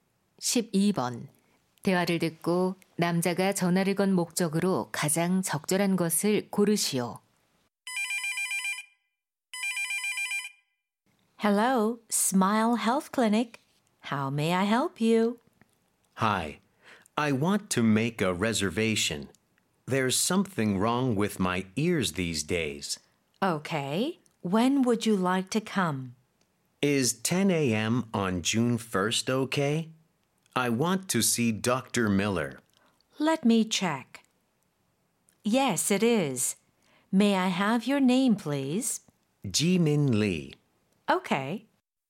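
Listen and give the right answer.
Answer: 진료 예약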